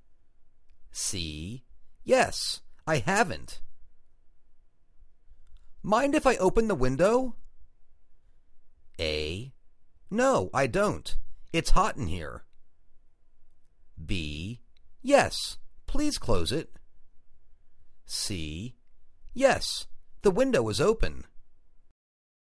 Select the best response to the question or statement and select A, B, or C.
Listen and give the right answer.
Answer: No, I don't. It's hot in here.